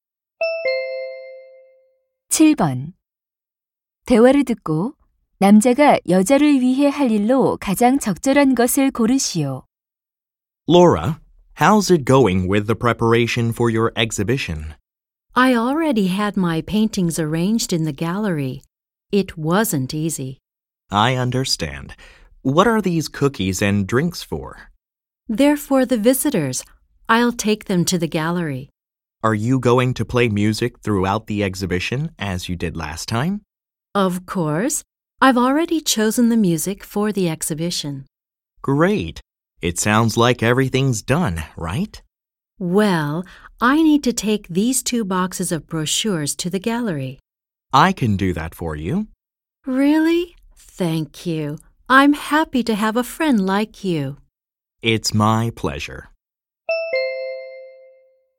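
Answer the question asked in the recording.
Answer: 안내 책자 두 상자를 갤러리로 옮기기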